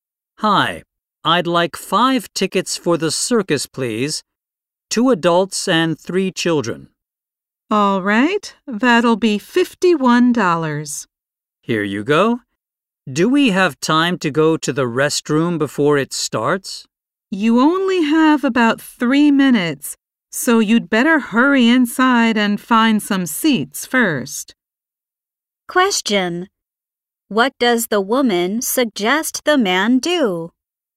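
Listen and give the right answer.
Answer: Hurry inside and find some seats first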